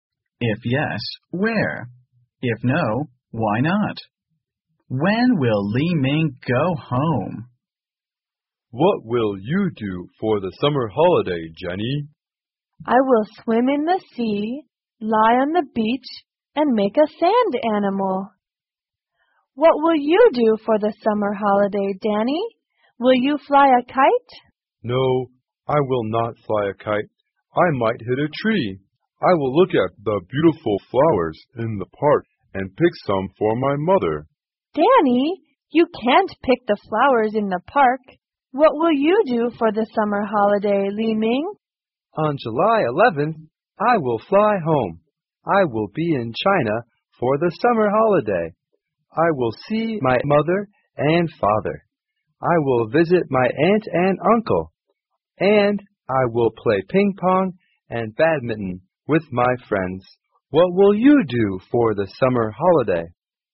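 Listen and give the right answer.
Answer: On July 11th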